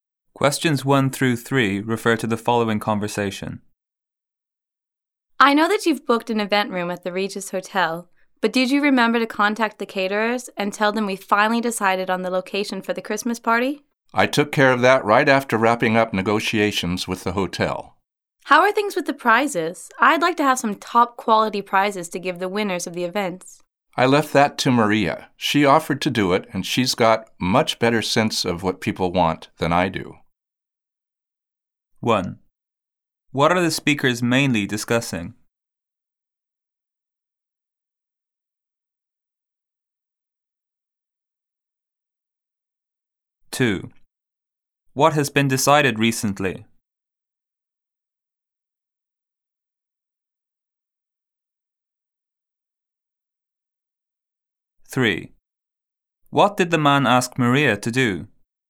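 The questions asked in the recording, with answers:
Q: What are the speakers mainly discussing?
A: Preparations for the Christmas party

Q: What has been decided recently?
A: The location of the Christmas party (the Regis Hotel)

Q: What did the man ask Maria to do?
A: Take care of the prizes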